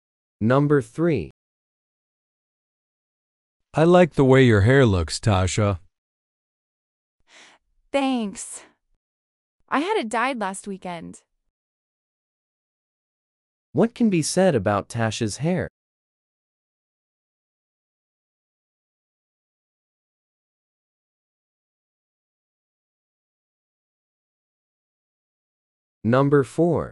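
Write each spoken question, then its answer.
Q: What can be said about Tasha's hair?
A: She had it dyed last weekend.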